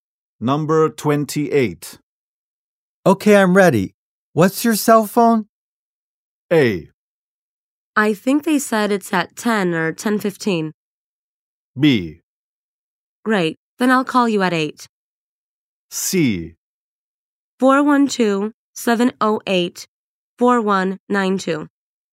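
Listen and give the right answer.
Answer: C: 412-708-4192.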